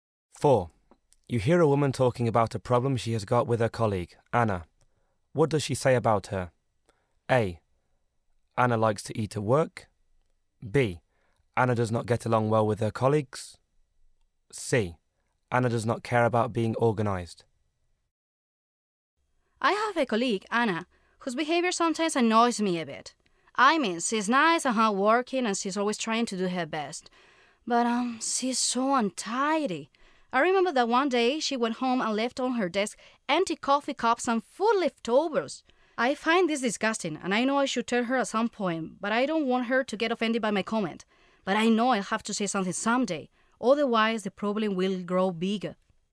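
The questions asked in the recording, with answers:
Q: What does she say about her?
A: C: Anna does not care about being organized.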